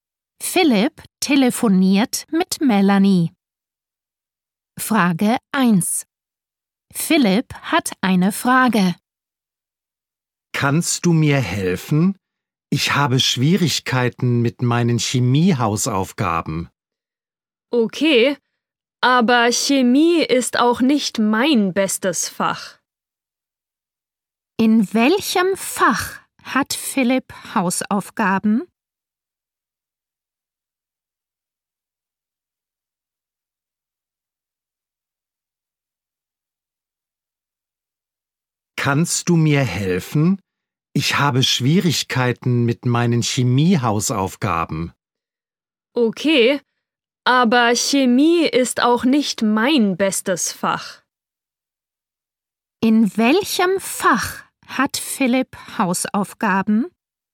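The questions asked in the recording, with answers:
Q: In welchem Fach hat Philipp Hausaufgaben?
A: Chemie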